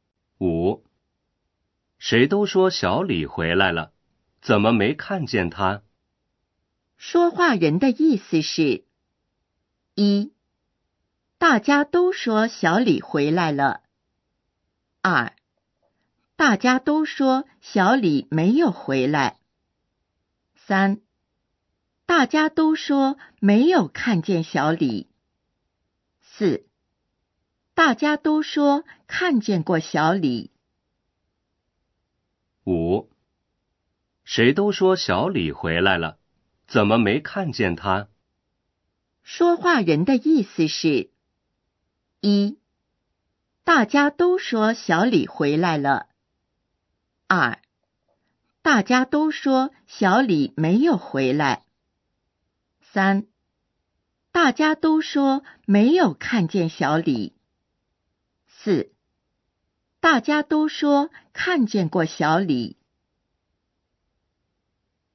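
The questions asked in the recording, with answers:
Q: 说话人的意思是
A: 一: 大家都说小李回来了。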